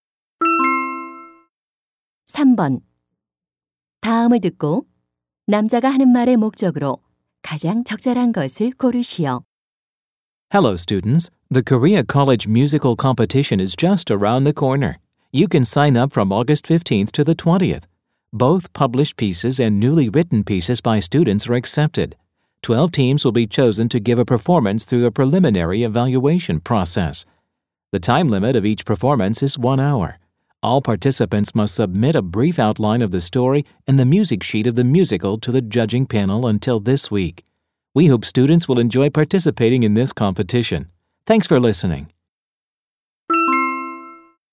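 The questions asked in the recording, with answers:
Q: 다음을 듣고 남자가 하는 말의 목적으로 가장 적절한 것을 고르시오.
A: 대학 뮤지컬 경연대회 참가 안내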